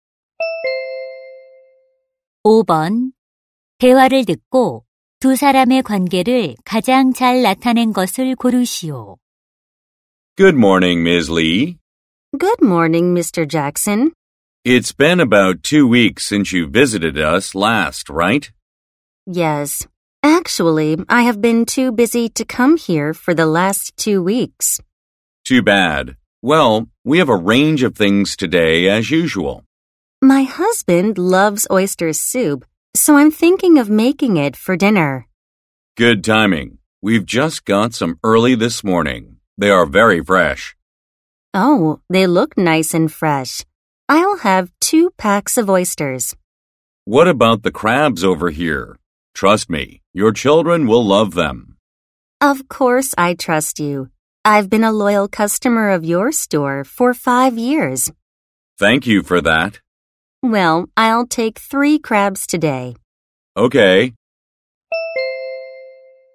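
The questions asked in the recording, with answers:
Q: 대화를 듣고 두 사람의 관계를 가장 잘 나타낸 것을 고르시오.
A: 손님 - 수산물 가게 주인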